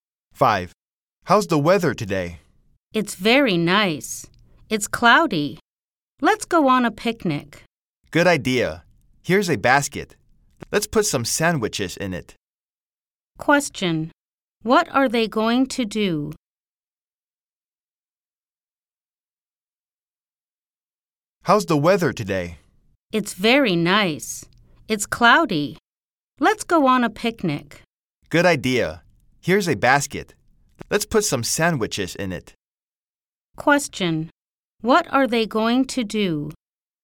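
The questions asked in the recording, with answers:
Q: What are they going to do?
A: Go on a picnic.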